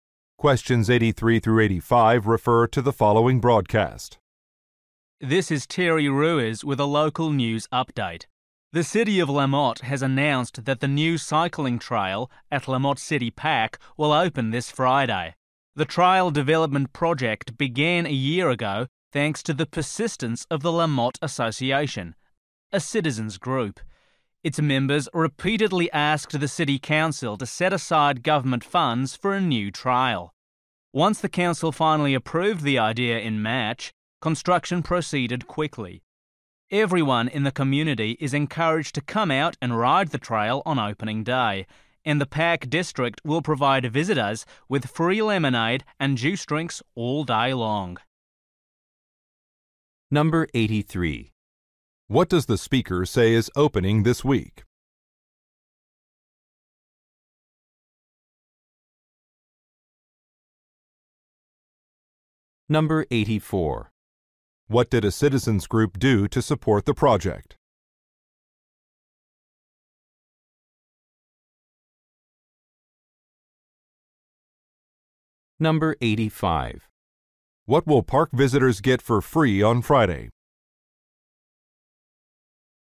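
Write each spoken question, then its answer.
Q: What does the speaker say is opening this week?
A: A cycling trail

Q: What did a citizens group do to support the project?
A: Repeatedly asked the City Council for funding

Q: What will park visitors get for free on Friday?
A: Drinks (lemonade and juice)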